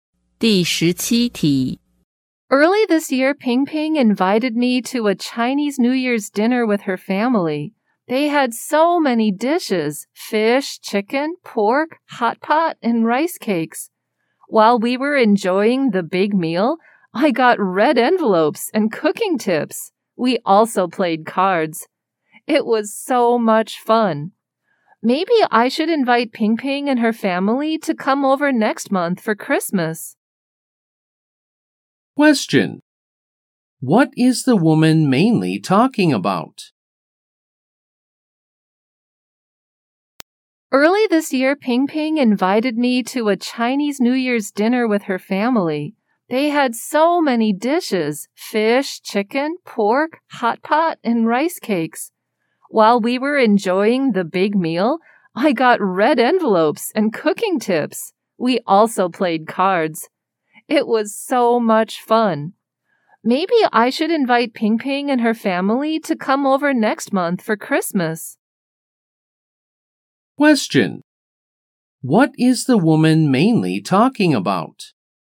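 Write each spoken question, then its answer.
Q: What is the woman mainly talking about?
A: A Chinese New Year's dinner with Ping Ping's family.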